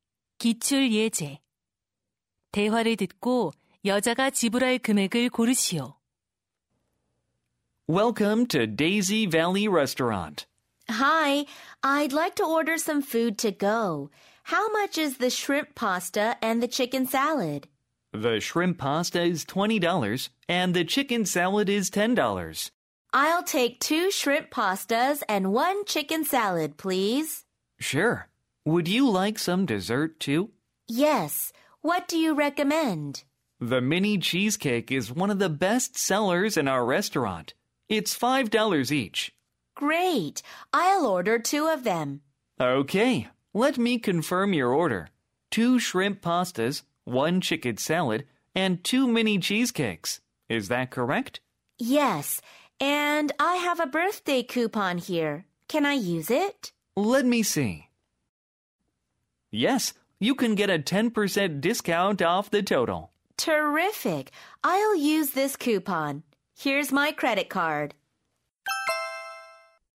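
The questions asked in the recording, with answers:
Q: 대화를 듣고 여자가 지불할 금액을 고르시오.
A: $54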